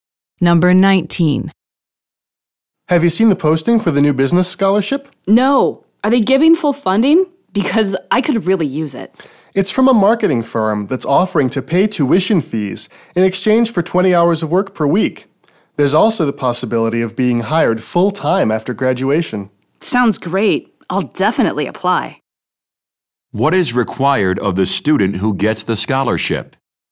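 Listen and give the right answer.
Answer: Working 20 hours per week for the firm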